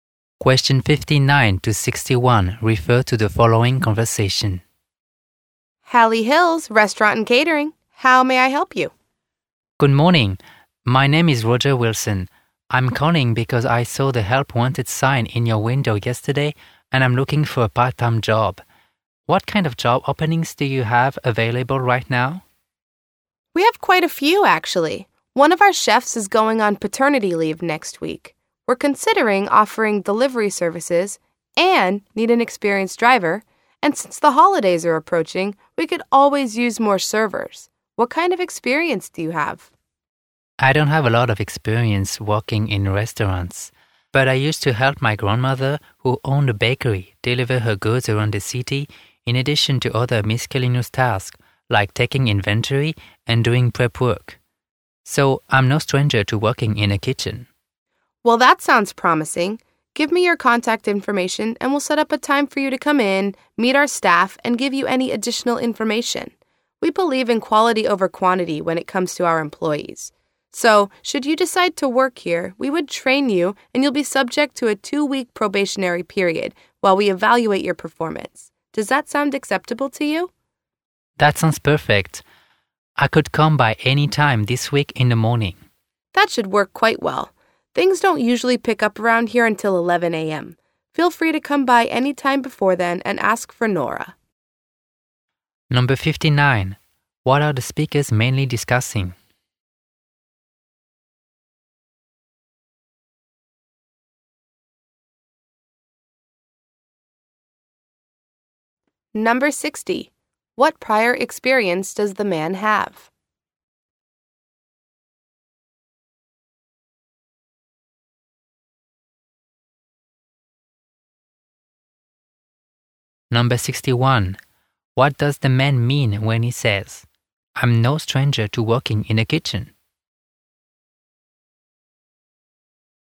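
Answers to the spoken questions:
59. A part-time job opening at the restaurant
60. He helped at his grandmother's bakery, including deliveries
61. He has kitchen experience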